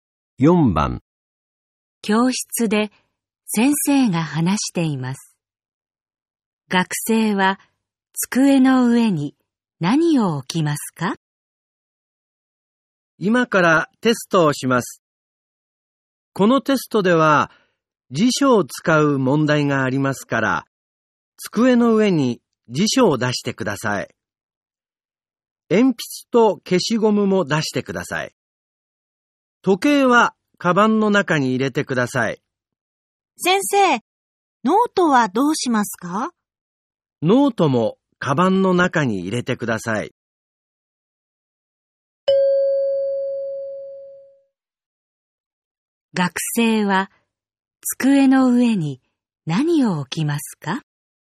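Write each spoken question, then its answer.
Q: 学生は机の上に何を置きますか?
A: 辞書と鉛筆と消しゴム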